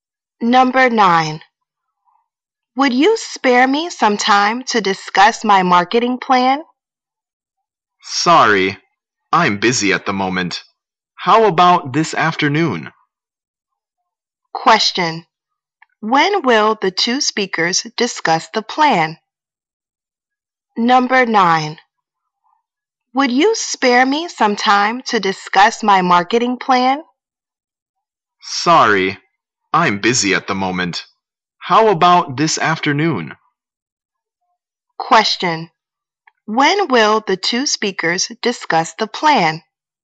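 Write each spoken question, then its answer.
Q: When will the two speakers discuss the plan?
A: This afternoon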